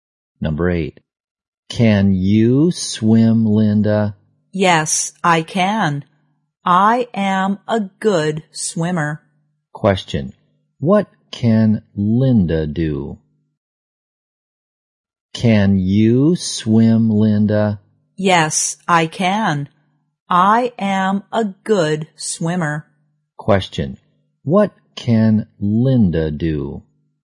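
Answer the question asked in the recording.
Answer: Swim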